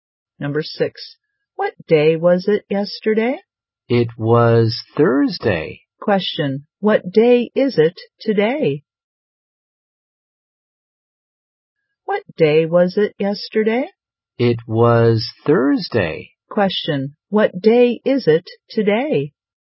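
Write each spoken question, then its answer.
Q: Question, what day is it today?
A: Friday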